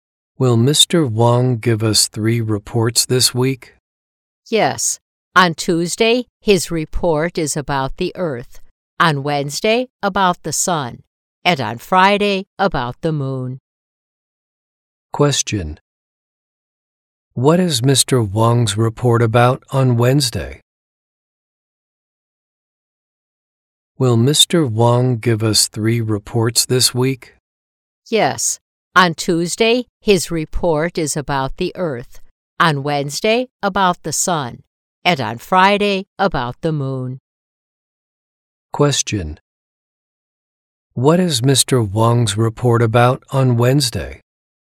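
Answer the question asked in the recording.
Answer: The Sun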